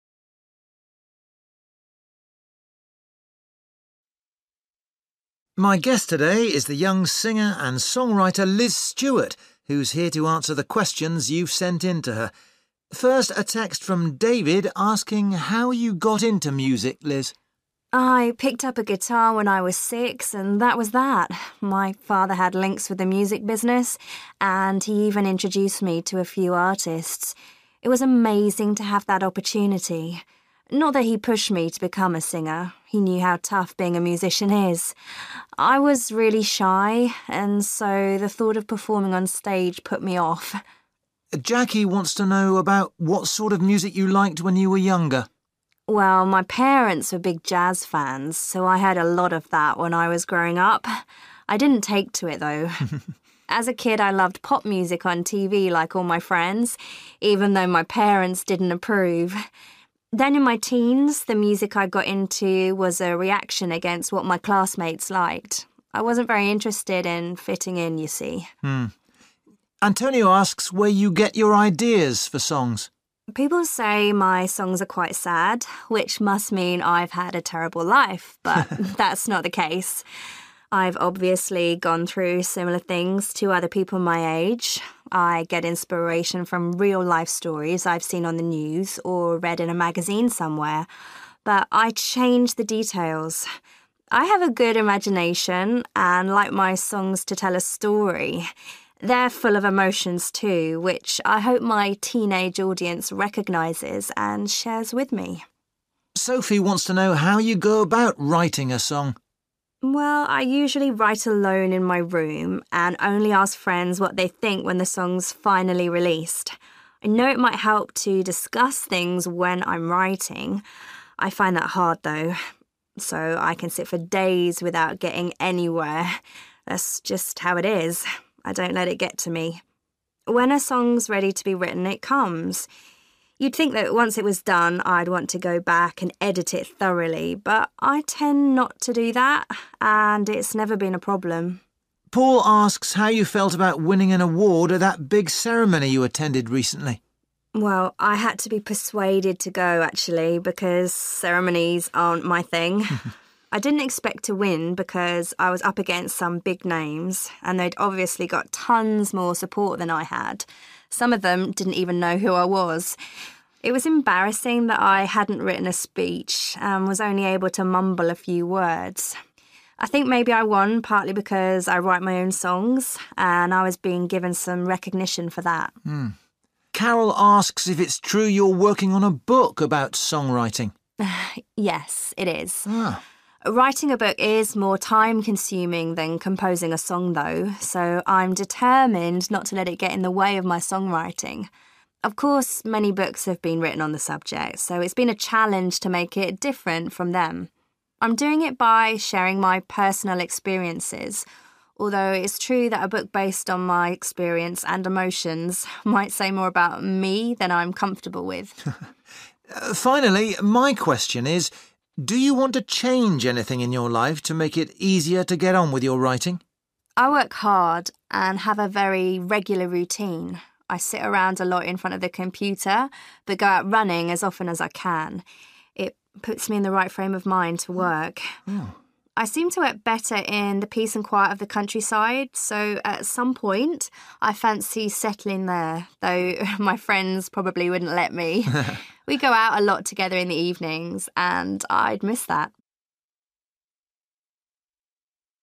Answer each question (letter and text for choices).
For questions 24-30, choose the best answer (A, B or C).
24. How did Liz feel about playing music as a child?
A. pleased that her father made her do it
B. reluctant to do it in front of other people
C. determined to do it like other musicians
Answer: B. reluctant to do it in front of other people

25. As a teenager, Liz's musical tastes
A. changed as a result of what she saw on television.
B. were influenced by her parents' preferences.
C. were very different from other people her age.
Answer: C. were very different from other people her age.

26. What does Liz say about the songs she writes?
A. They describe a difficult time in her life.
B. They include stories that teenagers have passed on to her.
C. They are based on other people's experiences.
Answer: C. They are based on other people's experiences.

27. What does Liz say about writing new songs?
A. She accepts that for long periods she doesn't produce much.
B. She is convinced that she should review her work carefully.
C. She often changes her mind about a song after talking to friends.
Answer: A. She accepts that for long periods she doesn't produce much.

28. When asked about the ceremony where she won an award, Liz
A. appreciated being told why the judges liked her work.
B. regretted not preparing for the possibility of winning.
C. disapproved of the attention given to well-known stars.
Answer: B. regretted not preparing for the possibility of winning.

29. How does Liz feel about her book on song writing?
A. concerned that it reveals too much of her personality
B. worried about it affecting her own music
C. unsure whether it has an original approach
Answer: A. concerned that it reveals too much of her personality

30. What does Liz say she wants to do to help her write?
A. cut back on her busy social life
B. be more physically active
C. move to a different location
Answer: C. move to a different location

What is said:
Interviewer: My guest today is the young singer and songwriter, Liz Stewart, who's here to answer the questions you've sent in to her. First, a text from David asking how you got into music, Liz.
Liz: I picked up a guitar when I was six and that was that. My father had links with the music business, and he even introduced me to a few artists. It was amazing to have that opportunity. Not that he pushed me to become a singer. He knew how tough being a musician is. I was really shy and so the thought of performing on stage put me off.
Interviewer: Jackie wants to know about what sort of music you liked when you were younger.
Liz: Well, my parents were big jazz fans, so I heard a lot of that when I was growing up – I didn't take to it, though. As a kid, I loved pop music on TV, like all my friends, even though my parents didn't approve! Then, in my teens, the music I got into was a reaction against what my classmates liked. I wasn't very interested in fitting in, you see.
Interviewer: Antonio asks where you get your ideas for songs.
Liz: People say my songs are quite sad, which must mean I've had a terrible life, but that's not the case. I've obviously gone through similar things to other people my age. I get inspiration from real life stories I've seen on the news or read in a magazine somewhere, but I change the details. I have a good imagination and like my songs to tell a story – they're full of emotions too, which I hope my teenage audience recognises and shares with me.
Interviewer: Sophie wants to know how you go about writing a song.
Liz: Well, I usually write alone in my room and only ask friends what they think when the song's finally released. I know it might help to discuss things when I'm writing – I find that hard though. So I can sit for days without getting anywhere. That's just how it is – I don't let it get to me. When a song's ready to be written, it comes. You'd think that once it was done, I'd want to go back and edit it thoroughly, but I tend not to do that, and it's never been a problem.
Interviewer: Paul asks how you felt about winning an award at that big ceremony you attended recently.
Liz: Well, I had to be persuaded to go actually, because ceremonies aren't my thing. I didn't expect to win because I was up against some big names and they'd obviously got tons more support than I had – some of them didn't even know who I was. It was embarrassing that I hadn't written a speech and was only able to mumble a few words. I think maybe I won partly because I write my own songs and I was being given some recognition for that.
Interviewer: Carole asks if it's true you're working on a book about song writing.
Liz: Yes, it is. Writing a book is more time consuming than composing a song, though – so I'm determined not to let it get in the way of my song writing. Of course, many books have been written on the subject, so it's been a challenge to make it different from them. I'm doing it by sharing my personal experiences, although it's true that a book based on my experience and emotions might say more about me than I'm comfortable with.
Interviewer: Finally, my question is: Do you want to change anything in your life to make it easier to get on with your writing?
Liz: I work hard and have a very regular routine. I sit around a lot in front of the computer, but go out running as often as I can – it puts me in the right frame of mind to work. I seem to work better in the peace and quiet of the countryside, so at some point I fancy settling there, though my friends probably wouldn't let me. We go out a lot together in the evenings and I'd miss that!